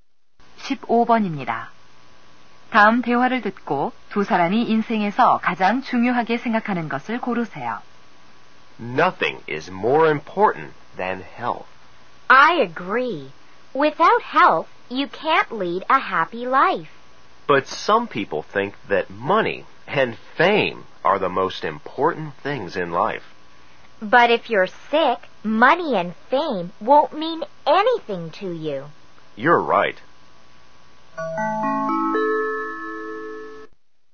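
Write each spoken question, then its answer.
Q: 다음 대화를 듣고 두 사람이 인생에서 가장 중요하게 생각하는 것을 고르세요.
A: 건강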